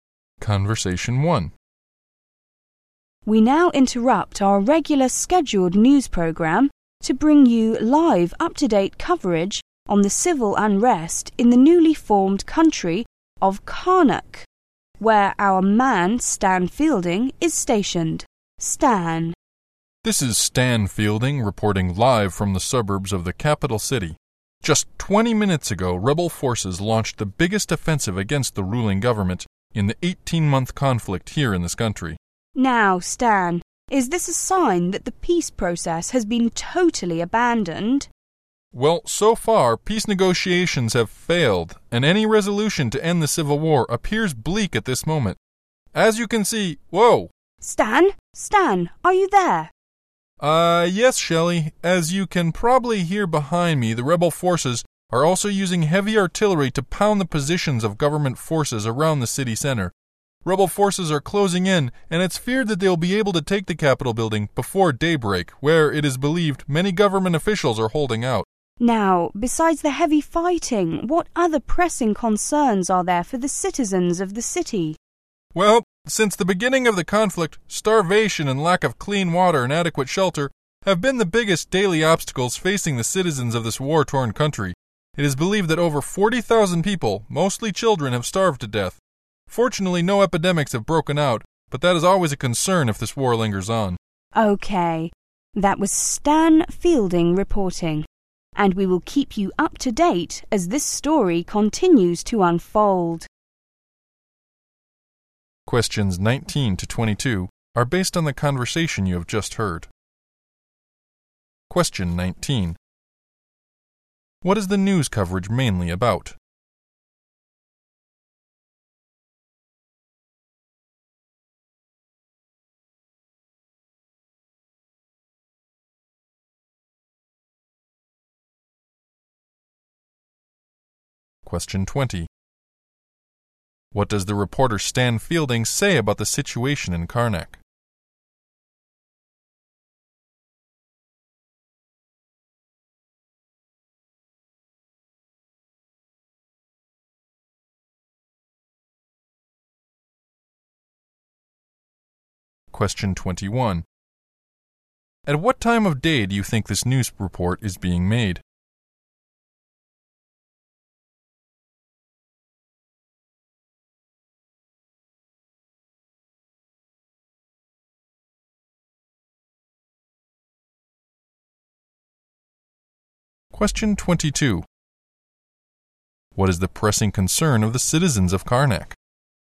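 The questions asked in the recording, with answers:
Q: What is the news coverage mainly about?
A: The civil war in Karnak

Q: What does the reporter Stan Fielding say about the situation in Karnak?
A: Peace talks have failed and any settlement looks unlikely; rebels are closing in on the capital.

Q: What is the pressing concern of the citizens of Karnak?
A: Starvation, lack of clean water and lack of shelter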